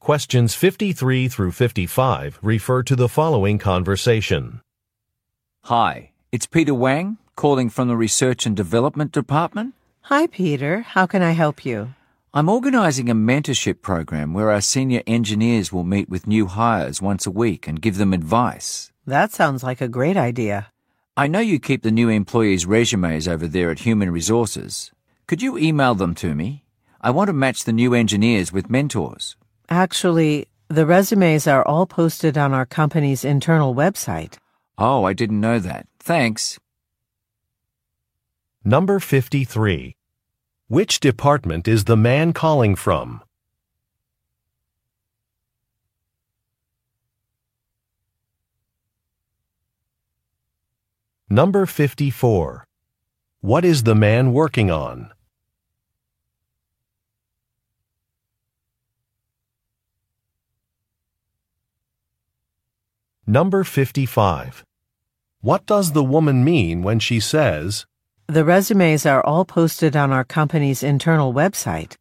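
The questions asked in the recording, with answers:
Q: Which department is the man calling from?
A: Research and Development

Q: What is the man working on?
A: Organizing a mentorship program for new hires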